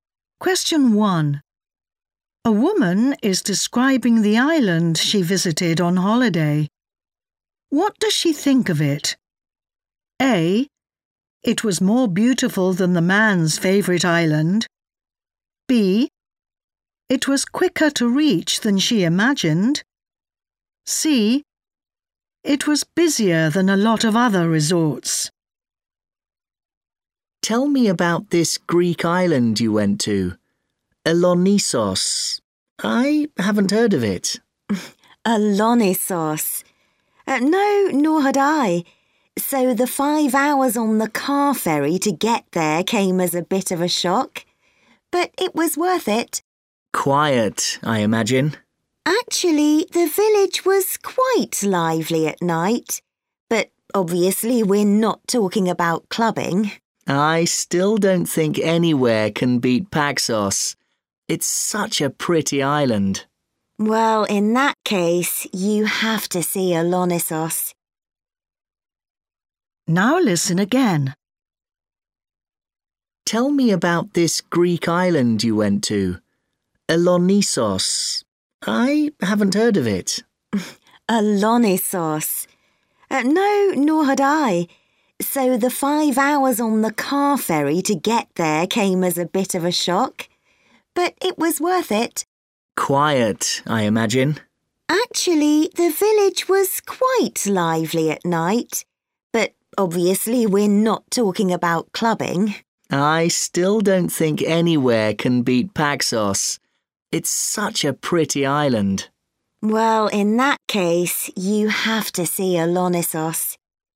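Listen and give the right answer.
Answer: A: It was more beautiful than the man's favourite island.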